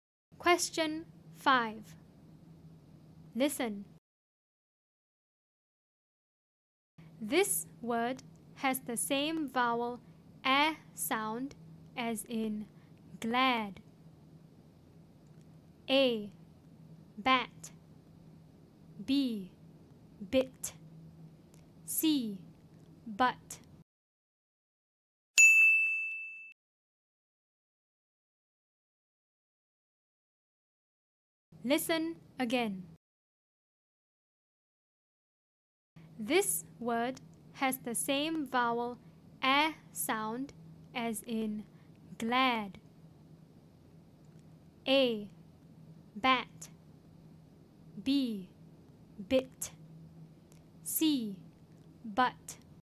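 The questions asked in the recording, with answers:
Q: This word has the same vowel a sound as in glad.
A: A: Bat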